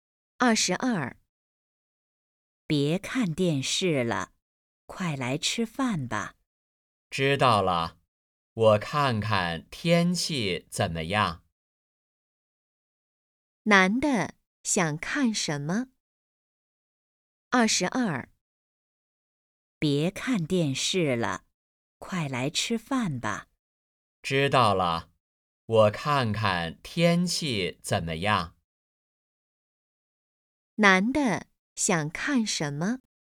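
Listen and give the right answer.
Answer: 天气(预报)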